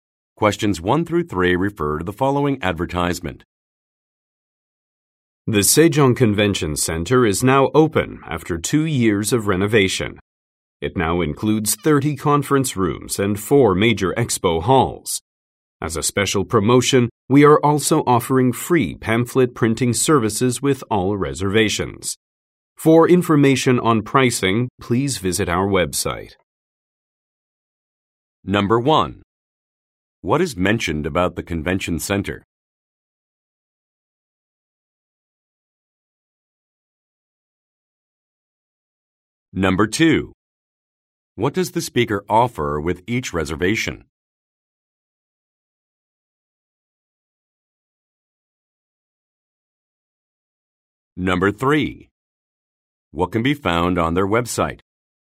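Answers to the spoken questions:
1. It has reopened after two years of renovation
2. Free pamphlet printing
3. Pricing information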